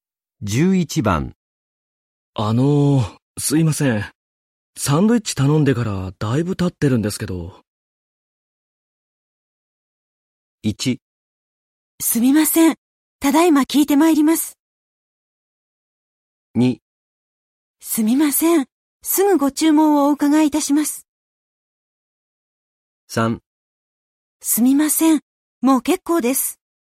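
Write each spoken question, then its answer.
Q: すいません。サンドイッチ頼んでからだいぶ経ってるんですけど。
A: 1: すみません。ただいま聞いてまいります。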